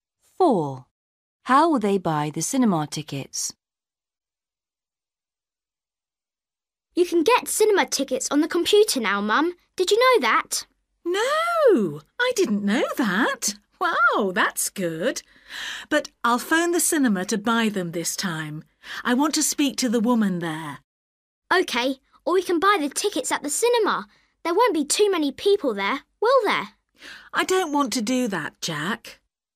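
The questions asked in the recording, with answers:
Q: How will they buy the cinema tickets?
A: by phone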